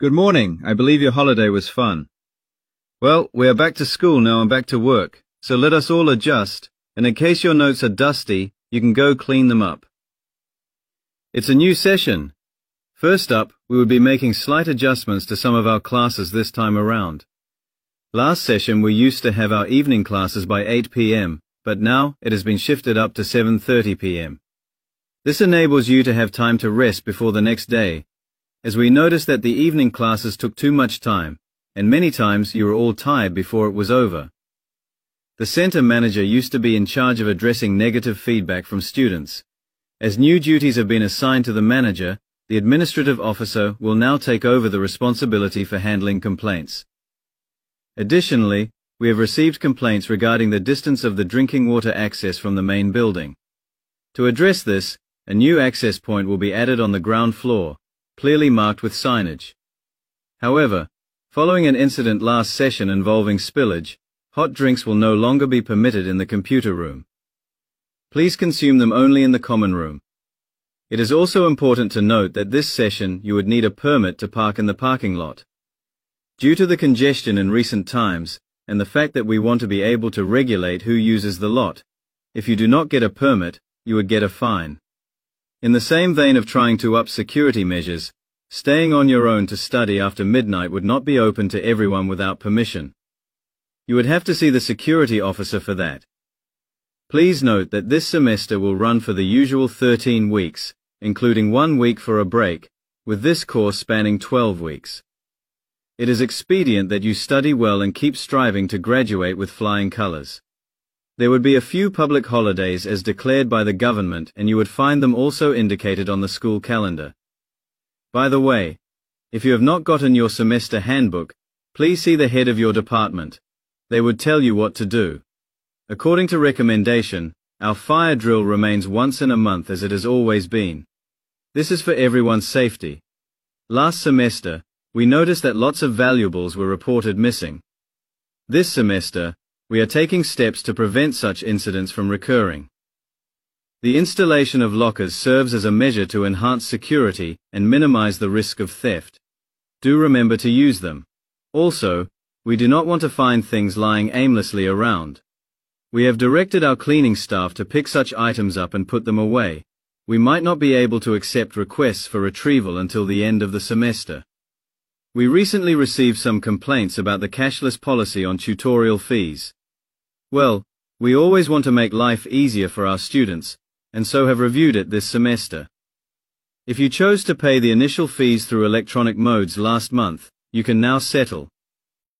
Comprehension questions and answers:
Complete the notes below. Write NO MORE THAN TWO WORDS AND/OR A NUMBER for each answer.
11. Class time: evening class starts at: 11............ p.m.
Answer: 7.30 / 7:30

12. Feedback: submit complaints to the 12............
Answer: administrative officer

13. hot drinks: in the 13............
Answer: common room

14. Parking: a 14............ is required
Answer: permit

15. Late-night private study: ask the 15............ for permission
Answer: security officer

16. The course will last for 16............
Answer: 12 weeks / twelve weeks

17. The 17............ is once a month.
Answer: fire drill

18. Valuable belongings are to be kept in the 18............ for safe storage.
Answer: locker / lockers